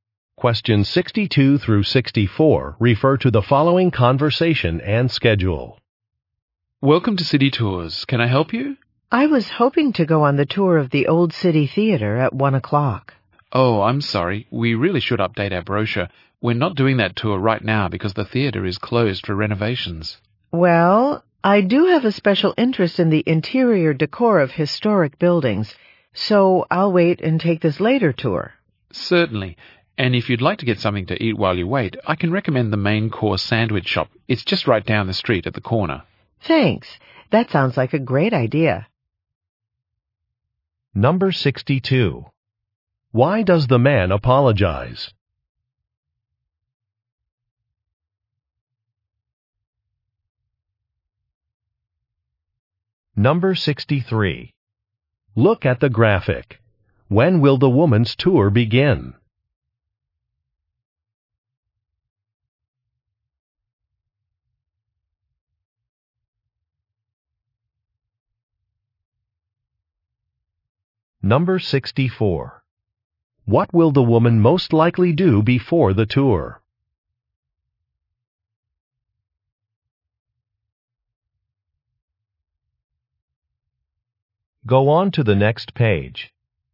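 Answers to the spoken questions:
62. The brochure is out of date; the theater tour isn't running
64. Get something to eat at a sandwich shop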